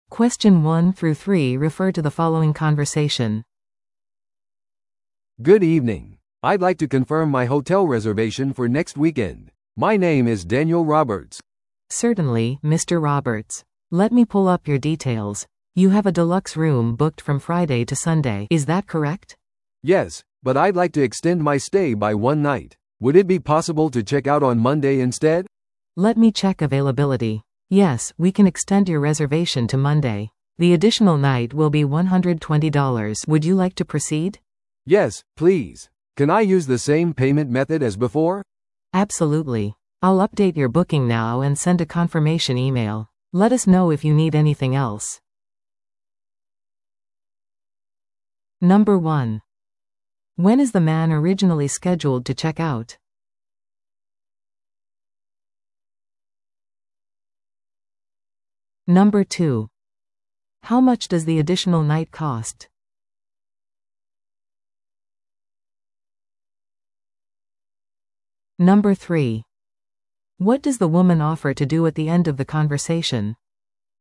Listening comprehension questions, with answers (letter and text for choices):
Listen to the audio below and answer the questions.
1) When is the man originally scheduled to check out?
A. 木曜日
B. 金曜日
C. 土曜日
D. 日曜日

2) How much does the additional night cost?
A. 80ドル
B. 100ドル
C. 120ドル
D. 150ドル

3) What does the woman offer to do at the end of the conversation?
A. 割引を提供する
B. 部屋をアップグレードする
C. 確認メールを送る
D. ルームサービスを提供する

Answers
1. D. 日曜日
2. C. 120ドル
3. C. 確認メールを送る

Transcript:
A: "Good evening. I'd like to confirm my hotel reservation for next weekend. My name is Daniel Roberts."
B: "Certainly, Mr. Roberts. Let me pull up your details. You have a deluxe room booked from Friday to Sunday. Is that correct?"
A: "Yes, but I'd like to extend my stay by one night. Would it be possible to check out on Monday instead?"
B: "Let me check availability. Yes, we can extend your reservation to Monday. The additional night will be 120 dollars. Would you like to proceed?"
A: "Yes, please. Can I use the same payment method as before?"
B: "Absolutely. I'll update your booking now and send a confirmation email. Let us know if you need anything else."